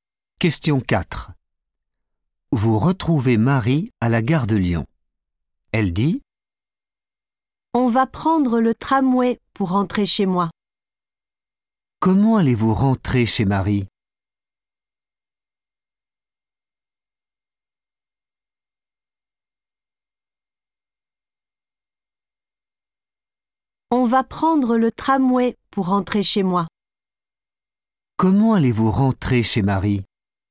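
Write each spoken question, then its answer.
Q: Comment allez-vous rentrer chez Marie ?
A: en tramway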